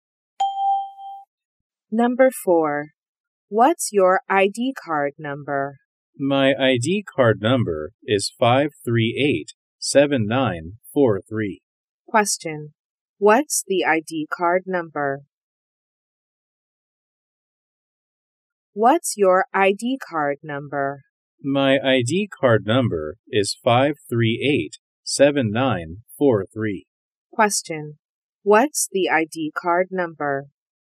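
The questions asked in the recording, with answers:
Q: what's the ID card number?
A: 5387943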